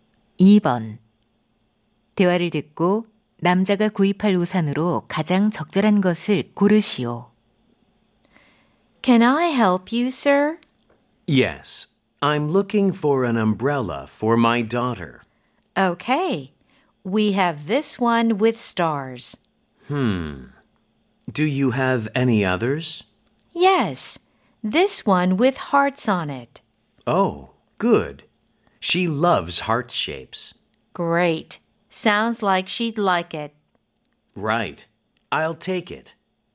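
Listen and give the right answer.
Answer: 하트 무늬 우산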